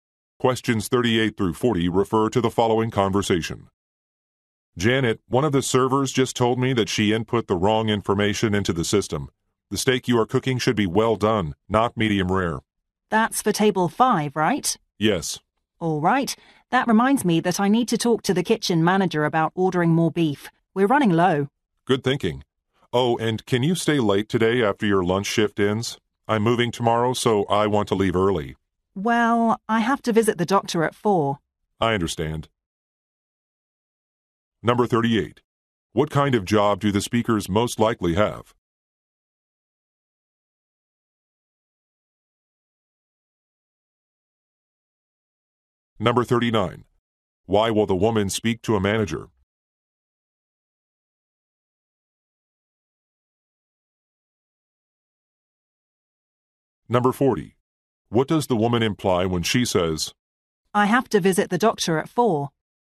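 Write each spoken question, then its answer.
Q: What kind of job do the speakers most likely have?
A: Restaurant cooks

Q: Why will the woman speak to a manager?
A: To order more beef

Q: What does the woman imply when she says,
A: She cannot stay late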